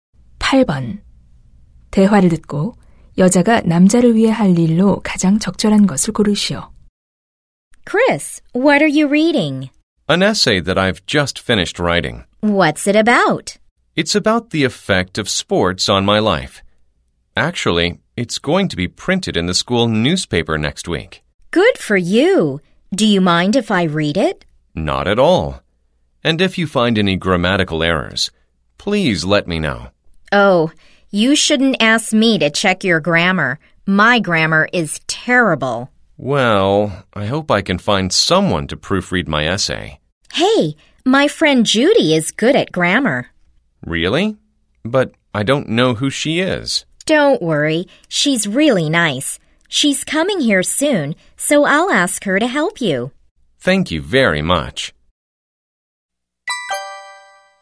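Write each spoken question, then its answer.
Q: 대화를 듣고 여자가 남자를 위해 할 일로 가장 적절한 것을 고르시오.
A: 친구 Judy에게 에세이 교정을 부탁하기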